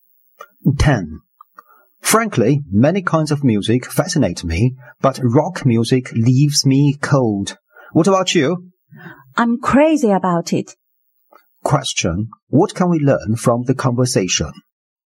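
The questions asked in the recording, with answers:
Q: What can we learn from the conversation?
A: They have different opinions of rock music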